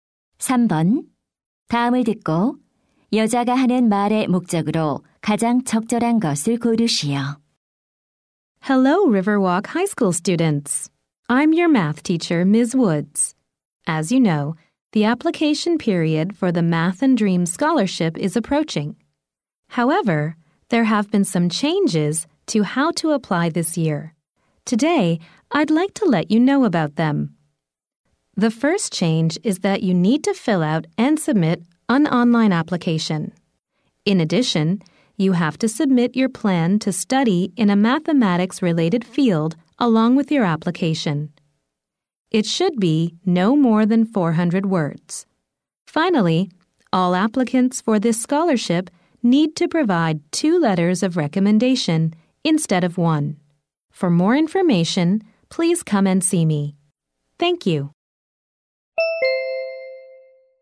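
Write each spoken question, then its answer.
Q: 다음을 듣고 여자가 하는 말의 목적으로 가장 적절한 것을 고르시오.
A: 장학금 신청 방법의 변경 사항을 안내하려고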